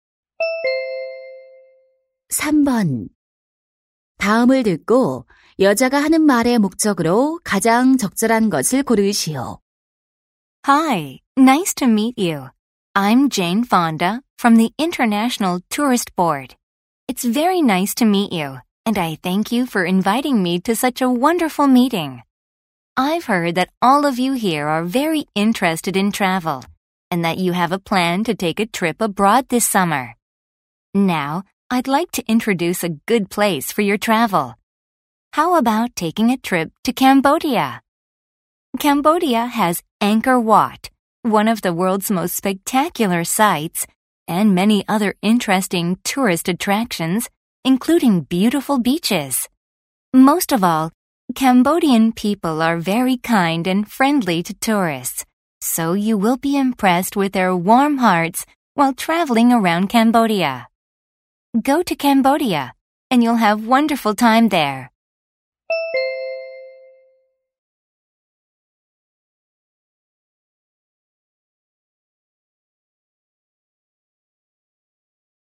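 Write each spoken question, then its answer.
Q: 다음을 듣고 여자가 하는 말의 목적으로 가장 적절한 것을 고르시오.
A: 캄보디아 여행을 홍보(추천)하려고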